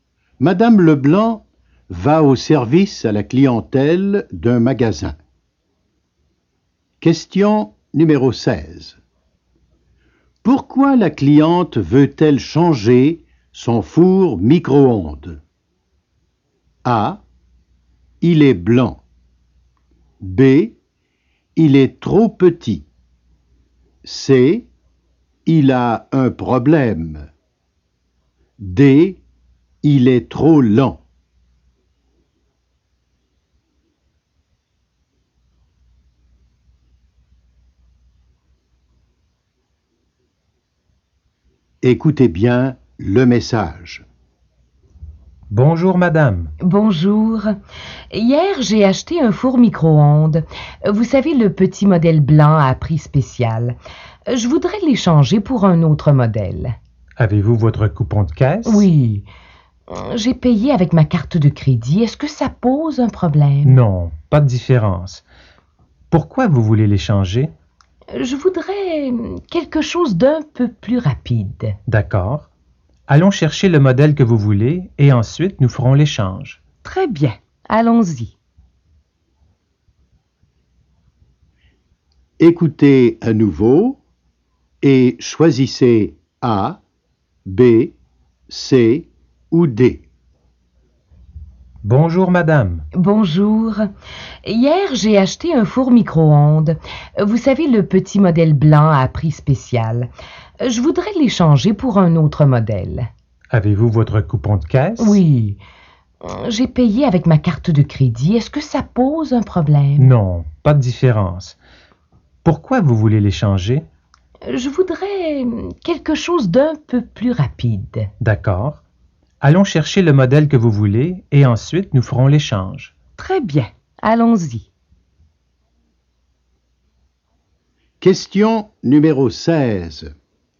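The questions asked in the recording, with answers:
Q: Pourquoi la cliente veut-elle changer son four micro-ondes?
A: D: Il est trop lent.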